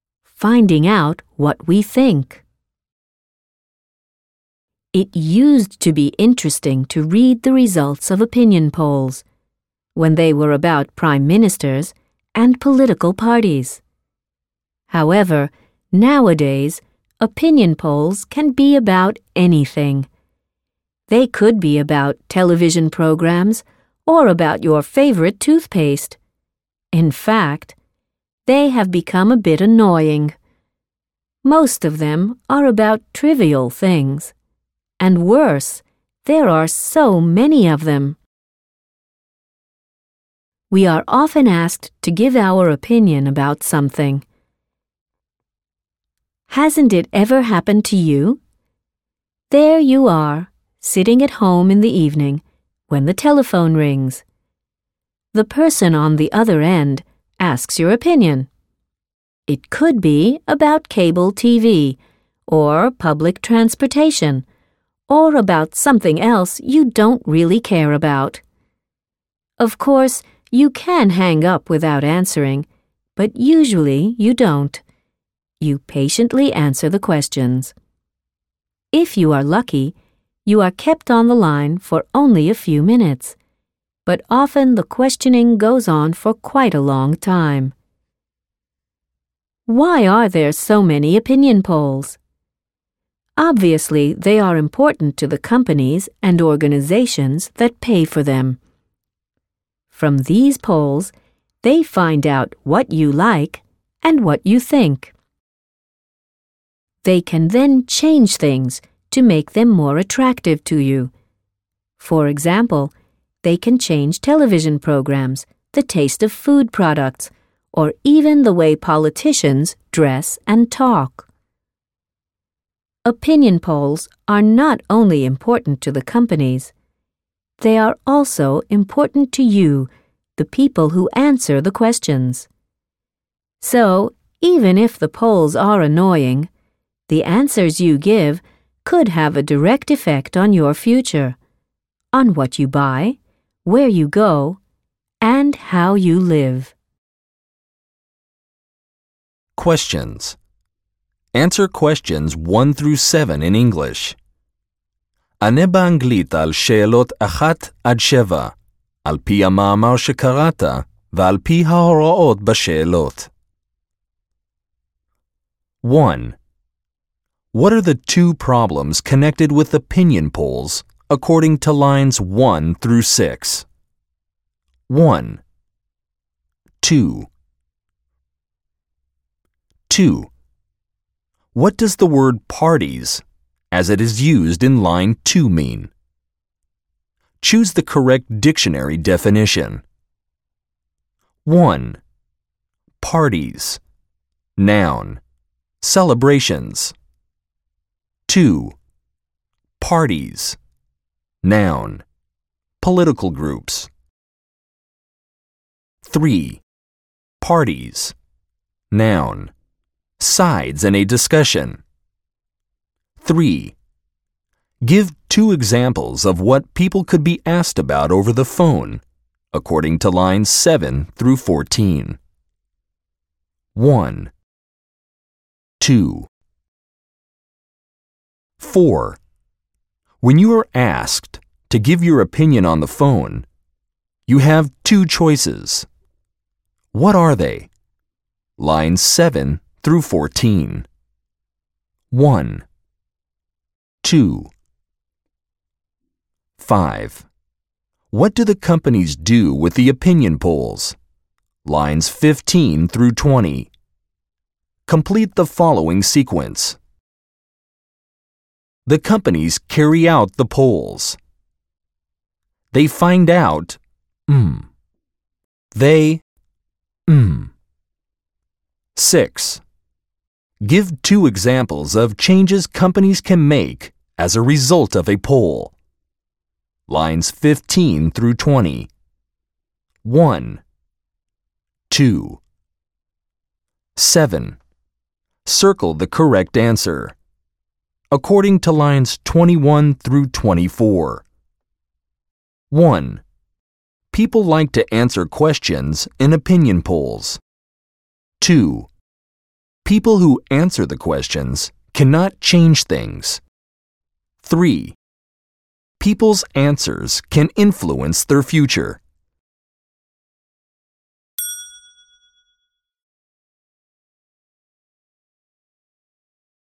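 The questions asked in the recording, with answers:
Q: What are the two problems connected with opinion polls, according to lines 1 through 6?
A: Most of them are about trivial things, and there are so many of them.

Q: What does the word parties, as it is used in line 2, mean?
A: 2: Political groups

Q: Give two examples of what people could be asked about over the phone, according to lines 7 through 14.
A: Cable TV and public transportation

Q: When you are asked to give your opinion on the phone, you have two choices. What are they?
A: Hang up without answering, or answer the questions

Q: What do the companies do with the opinion polls?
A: They find out what you like and think, then change things to make them more attractive to you.

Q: Give two examples of changes companies can make as a result of a poll.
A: Change television programs; change the taste of food products

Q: Circle the correct answer.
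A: 3: People's answers can influence their future.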